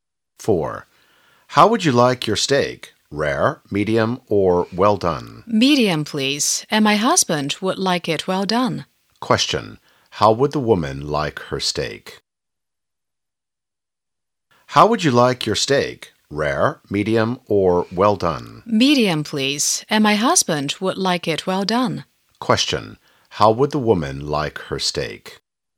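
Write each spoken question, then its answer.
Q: Question. How would the woman like her steak?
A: Medium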